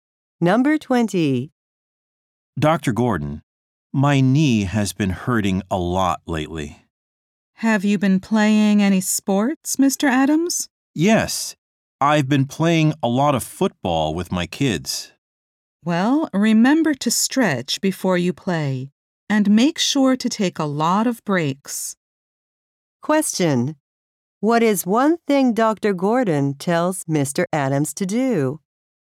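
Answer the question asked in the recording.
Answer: Stretch before playing (and take many breaks).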